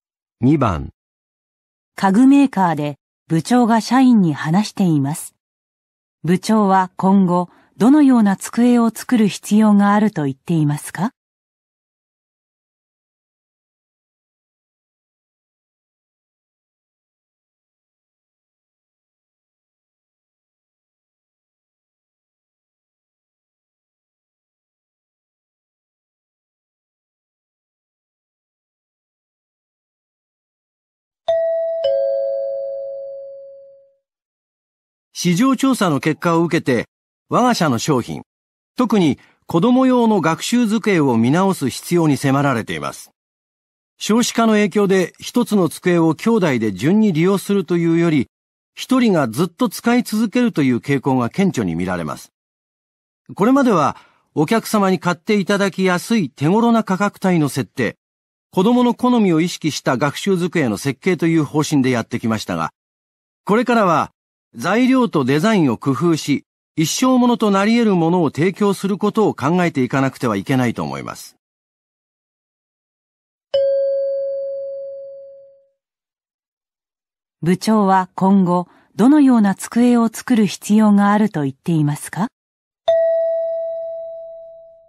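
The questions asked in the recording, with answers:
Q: 部長は今後、どのような机を作る必要があると言っていますか?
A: 材料とデザインを工夫した、一生使える机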